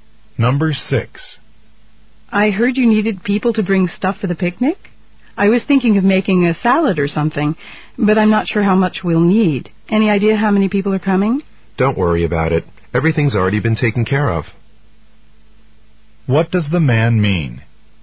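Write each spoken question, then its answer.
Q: What does the man mean?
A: The woman doesn't need to bring anything.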